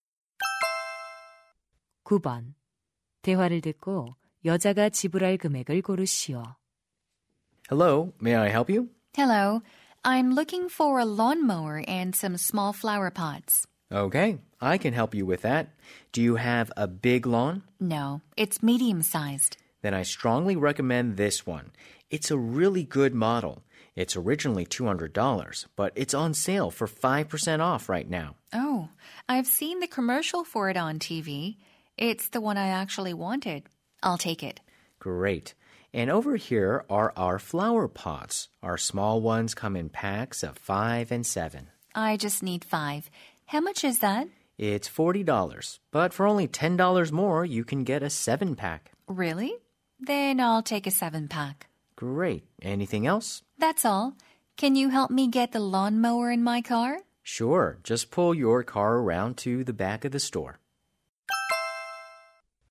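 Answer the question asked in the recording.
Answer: $240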